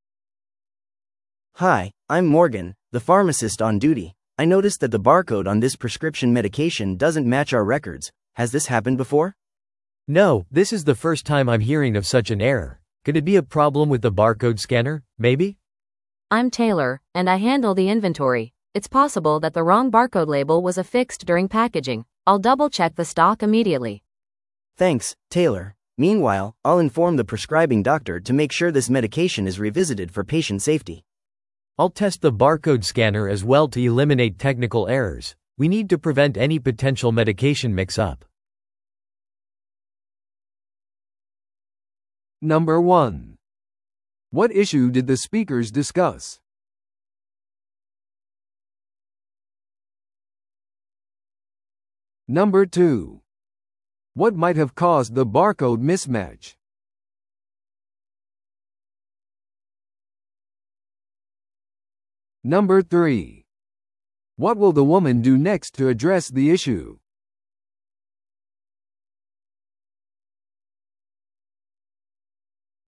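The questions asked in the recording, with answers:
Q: What issue did the speakers discuss?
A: A prescription medication's barcode doesn't match the pharmacy's records

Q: What might have caused the barcode mismatch?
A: The wrong barcode label may have been put on during packaging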